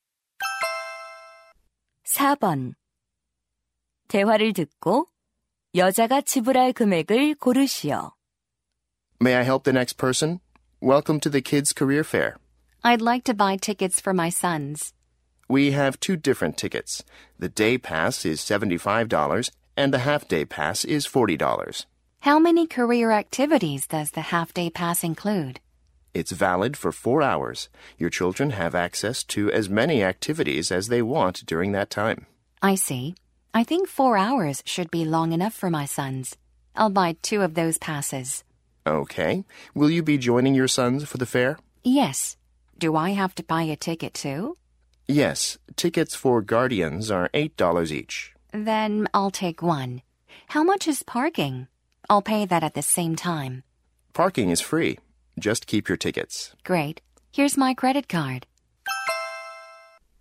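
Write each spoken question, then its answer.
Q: 대화를 듣고 여자가 지불할 금액을 고르시오.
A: $88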